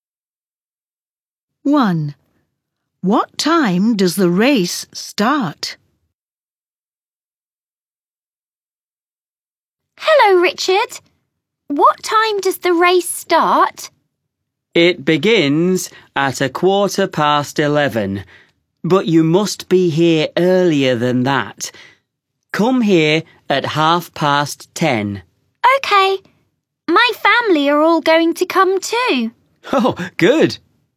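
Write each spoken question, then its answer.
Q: What time does the race start?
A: 11:15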